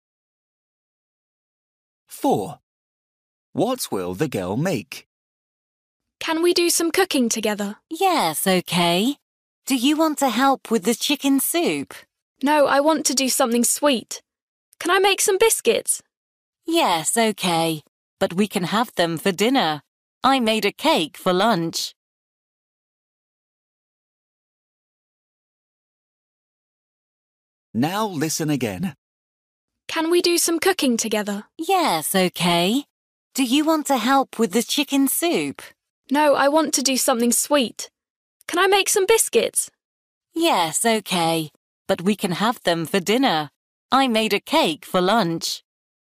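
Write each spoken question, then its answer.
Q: What will the girl make?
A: Biscuits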